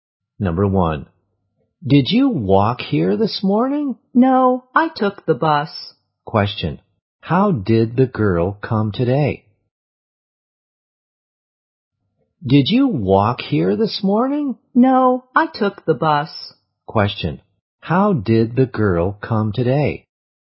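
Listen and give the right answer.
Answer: By bus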